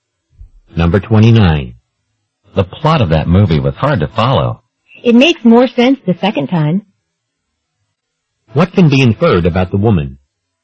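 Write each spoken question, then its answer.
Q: What can be inferred about the woman?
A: She has seen the movie more than once.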